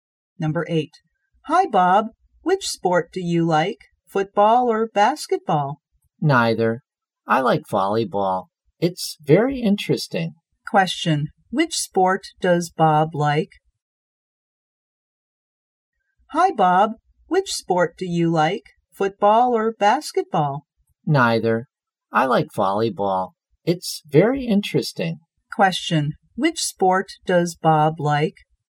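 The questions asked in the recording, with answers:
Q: Which sport does Bob like?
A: Volleyball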